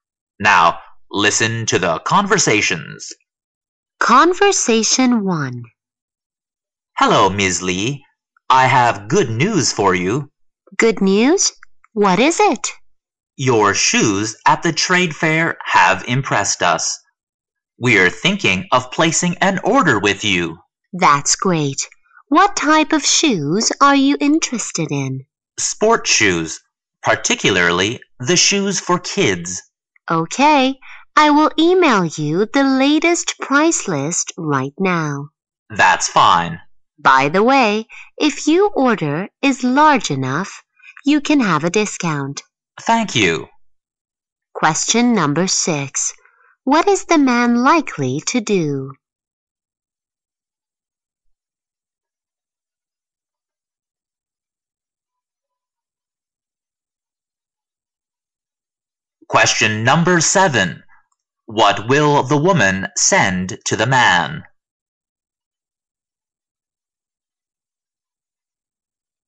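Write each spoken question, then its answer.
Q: Question number 6. What is the man likely to do?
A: Place an order for sport shoes

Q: Question number 7. What will the woman send to the man?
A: The latest price list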